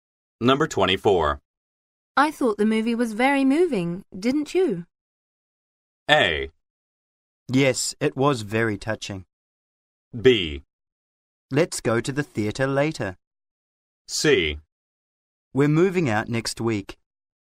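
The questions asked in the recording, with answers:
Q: I thought the movie was very moving, didn't you?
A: A: Yes, it was very touching.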